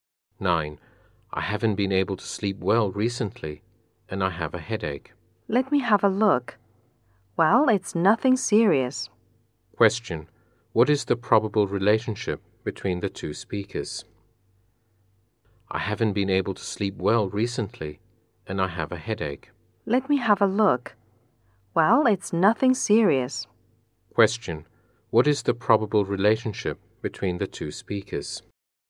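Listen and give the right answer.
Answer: Patient and doctor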